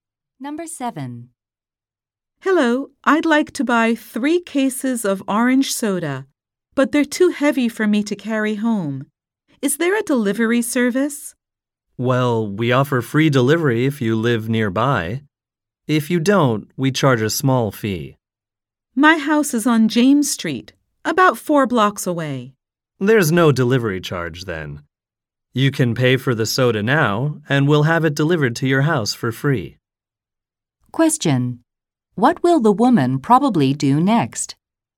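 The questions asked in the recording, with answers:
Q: What will the woman probably do next?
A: Pay for the soda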